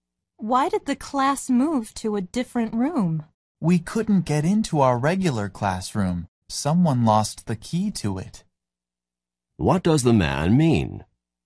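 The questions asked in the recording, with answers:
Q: What does the man mean?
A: They couldn't get into the regular classroom because someone lost the key.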